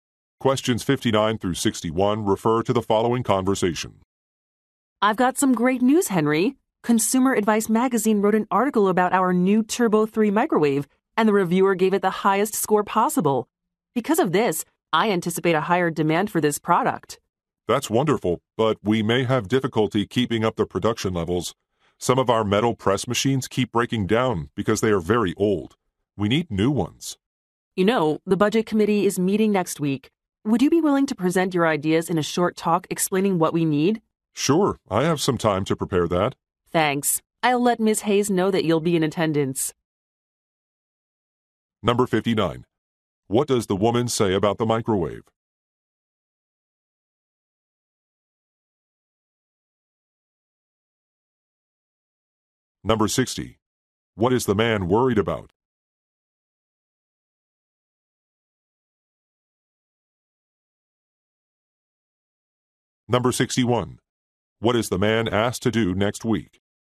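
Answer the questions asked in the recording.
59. It got the highest score in a magazine review
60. Keeping up production levels
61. Give a short talk to the budget committee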